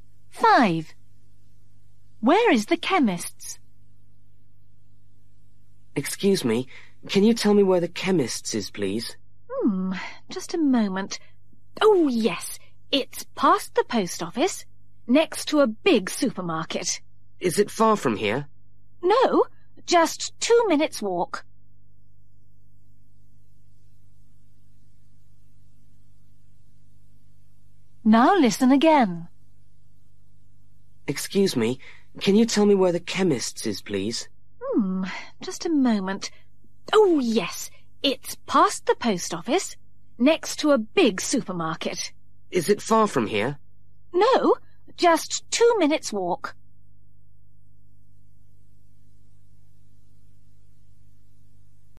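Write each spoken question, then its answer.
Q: Where is the chemist's?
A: Past the post office, next to a big supermarket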